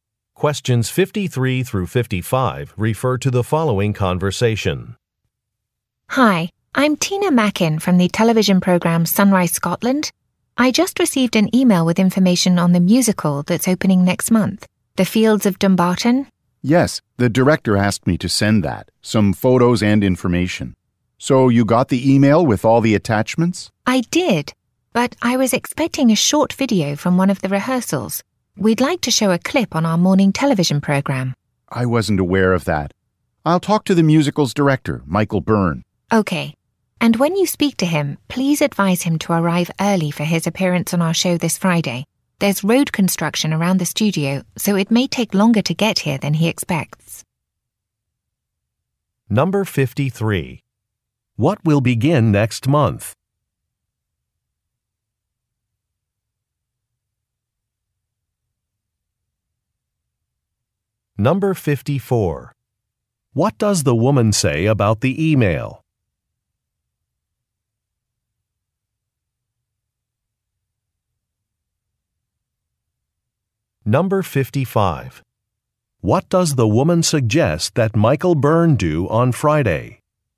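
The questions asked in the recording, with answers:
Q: What will begin next month?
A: A musical

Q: What does the woman say about the email?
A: It lacked a rehearsal video

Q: What does the woman suggest that Michael Byrne do on Friday?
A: Arrive early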